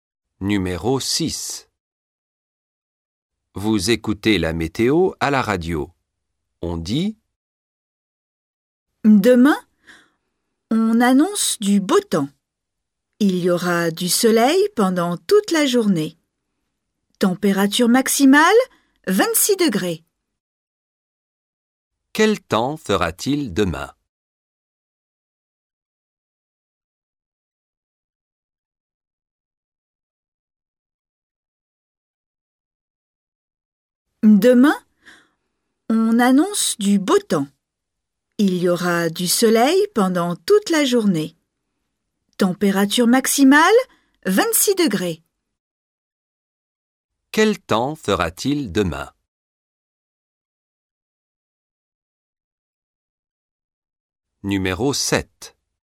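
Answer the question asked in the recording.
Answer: Beau temps, du soleil toute la journée, 26 degrés maximum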